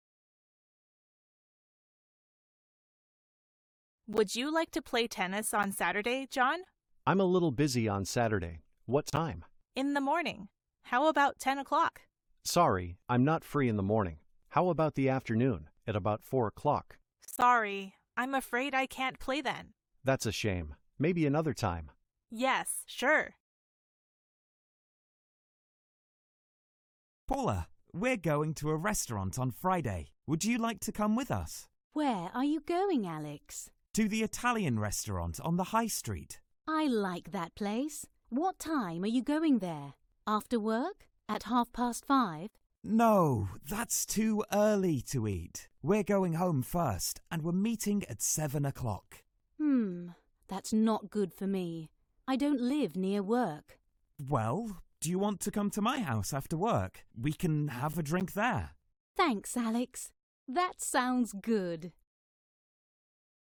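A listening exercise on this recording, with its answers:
I. Listen and complete the blanks (Nghe và điền vào chỗ trống).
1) Sally: to play tennis on Saturday, John?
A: Would you like

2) John: I'm a little on Saturday.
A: busy

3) John: Sorry, I'm in the morning.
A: not free

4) Sally: Sorry, I'm afraid I play then.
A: can't

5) Would you like to with us?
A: come

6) Paula: are you going there?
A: What time

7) We're going home first and we're meeting at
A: 7 o'clock

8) Paula: Mm, that's for me.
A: not good

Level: A0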